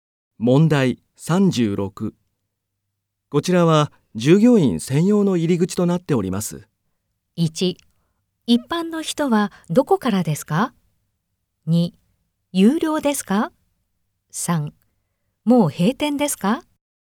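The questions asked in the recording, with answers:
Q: こちらは従業員専用の入り口となっております。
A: 1: 一般の人はどこからですか?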